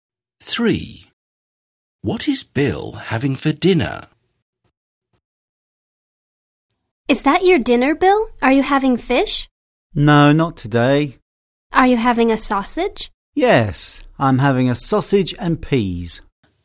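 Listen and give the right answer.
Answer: A sausage and peas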